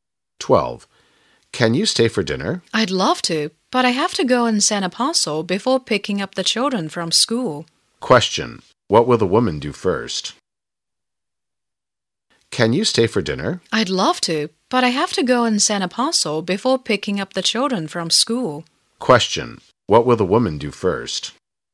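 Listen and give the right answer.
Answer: Send a parcel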